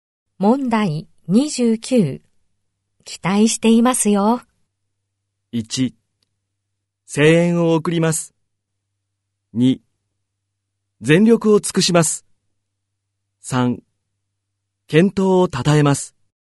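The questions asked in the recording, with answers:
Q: 期待していますよ。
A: 2: 全力を尽くします。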